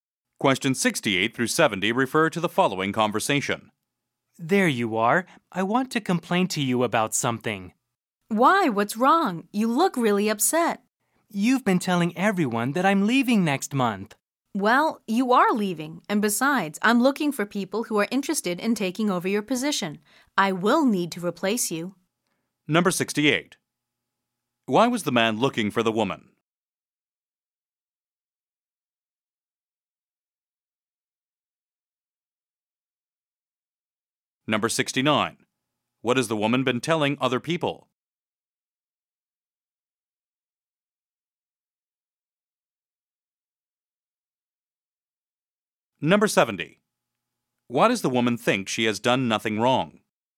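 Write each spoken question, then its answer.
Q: Why was the man looking for the woman?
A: To complain to her

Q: What has the woman been telling other people?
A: That the man is leaving next month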